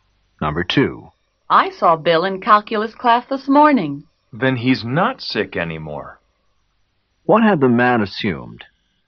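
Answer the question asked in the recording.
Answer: That Bill was sick.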